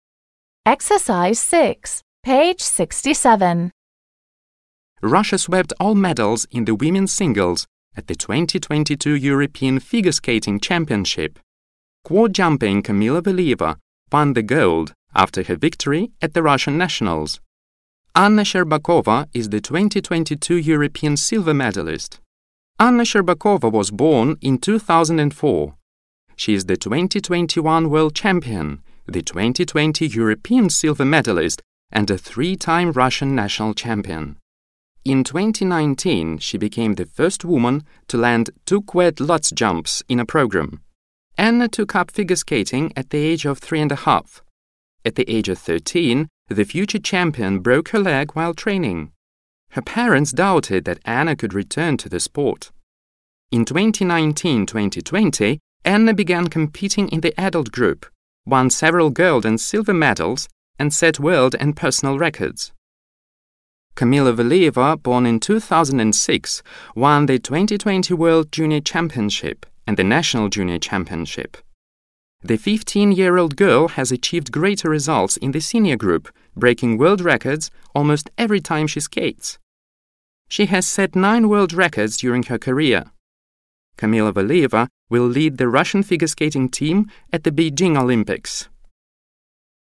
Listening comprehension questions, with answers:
6. Put the adjectives in brackets in the correct comparative or superlative form. Decide if the statements are T (true) or F (false). Listen and check.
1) Shcherbakova and Valieva are two of the most successful skaters in Russia.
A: True

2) Kamila Valieva is younger than Anna Shcherbakova.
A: True

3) Kamita Valieva is the most talented jumper in skating.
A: True

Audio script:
Russia swept all medals in the women's singles at the 2022 European Figure Skating Championship. Quad-jumping Kamila Valieva won the gold, after her victory at the Russian nationals. Anna Shcherbakova is the 2022 European silver medalist.
Anna Shcherbakova was born in 2004. She is the 2021 World champion, the 2020 European silver medalist, and a three-time Russian national champion. In 2019 she became the first woman to land two quad Lutz jumps in a program. Anna took up figure skating at the age of 3.5. At the age of 13 the future champion broke her leg while training. Her parents doubted that Anna could return to the sport. In 2019-2020, Anna began competing in the adult group, won several gold and silver medals and set world and personal records.
Kamila Valieva, born in 2006, won the 2020 World Junior championship, and the national junior championship. The 15-year-old girl has achieved greater results in the senior group, breaking world records almost every time she skates. She has set nine world records during her career. Kamila Valieva will lead the Russian figure skating team at the Beijing Olympics.

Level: 7 класс